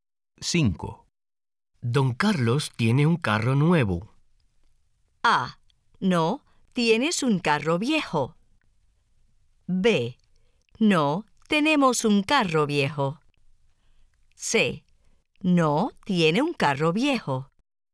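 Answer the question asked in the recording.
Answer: C: No, tiene un carro viejo.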